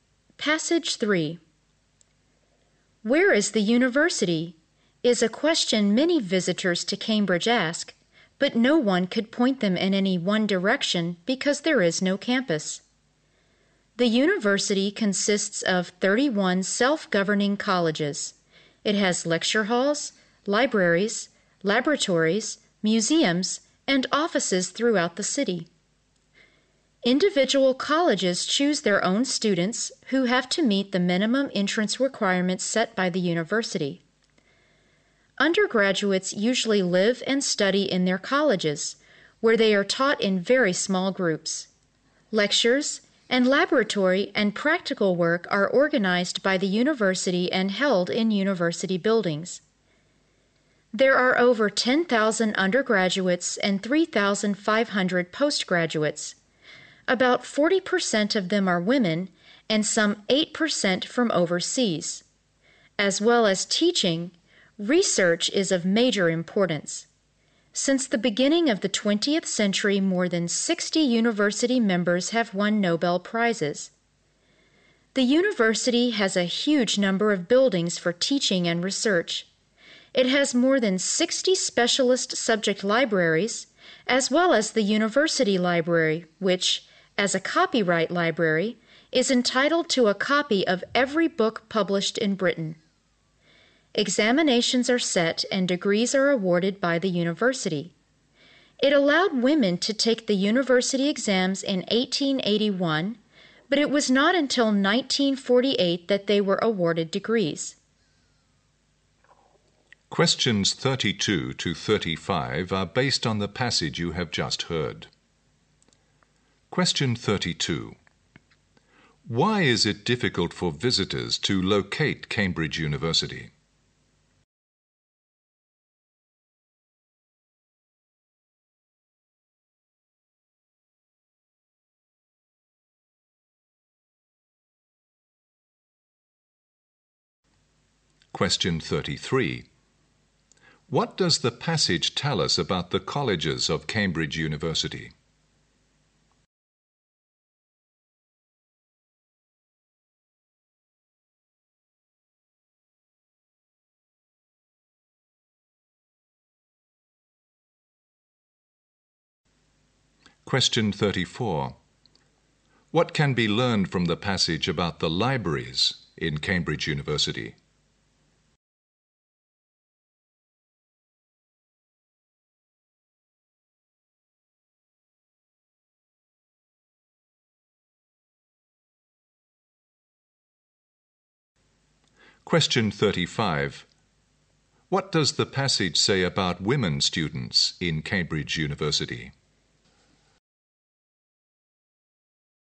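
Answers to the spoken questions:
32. Because it has no campus; its buildings are spread throughout the city.
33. There are 31 self-governing colleges that choose their own students.
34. It has over 60 specialist libraries, and the university library gets a copy of every book published in Britain.
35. They could take exams from 1881 but weren't awarded degrees until 1948.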